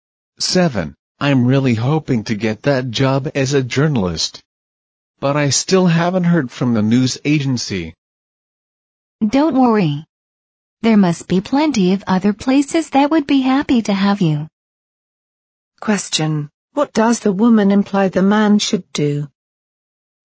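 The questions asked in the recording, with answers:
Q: What does the woman imply the man should do?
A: Apply for jobs at other places.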